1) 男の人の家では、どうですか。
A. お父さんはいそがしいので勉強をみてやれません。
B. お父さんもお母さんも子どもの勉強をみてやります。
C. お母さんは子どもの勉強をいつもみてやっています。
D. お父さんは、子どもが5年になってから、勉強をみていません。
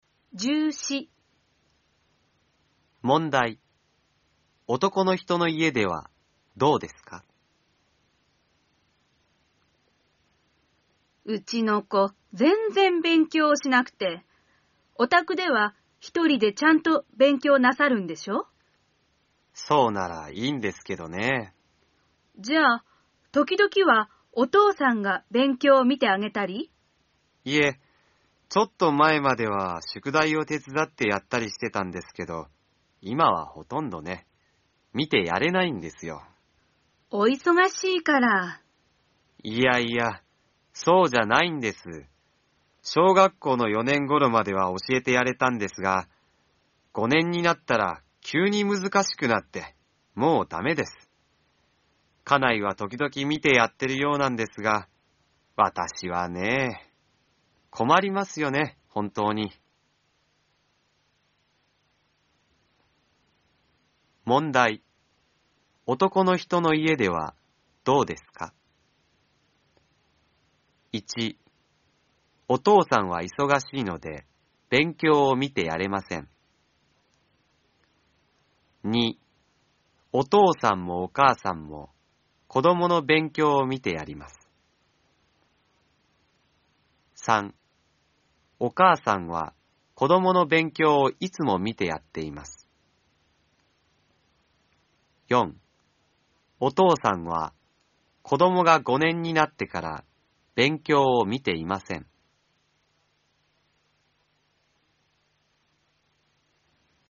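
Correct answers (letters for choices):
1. D

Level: N4 ĐỀ 2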